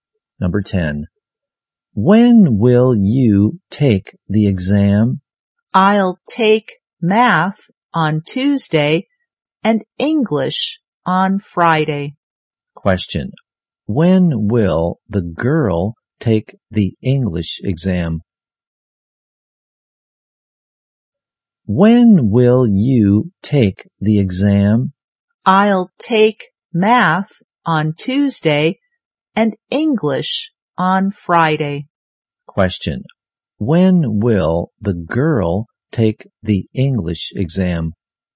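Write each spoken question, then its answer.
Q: Question. When will the girl take the English exam?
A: On Friday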